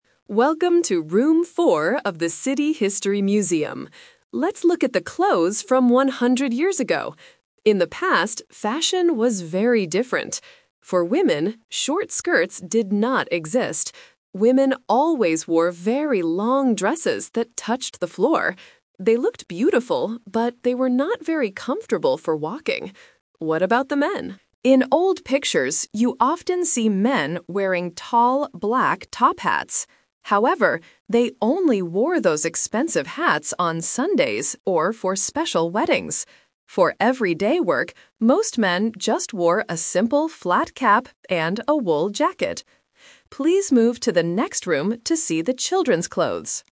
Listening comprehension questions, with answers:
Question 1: What did women always wear one hundred years ago?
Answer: Long dresses.

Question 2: When did men wear tall, black top hats?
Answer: On Sundays or for weddings.

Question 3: What did most men wear for everyday work?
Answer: A simple flat cap.

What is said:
Audio Guide: Welcome to Room 4 of the City History Museum. Let's look at the clothes from one hundred years ago. In the past, fashion was very different. For women, short skirts did not exist. Women always wore very long dresses that touched the floor. They looked beautiful, but they were not very comfortable for walking. What about the men? In old pictures, you often see men wearing tall, black top hats. However, they only wore those expensive hats on Sundays or for special weddings. For everyday work, most men just wore a simple flat cap and a wool jacket. Please move to the next room to see the children's clothes.

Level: A2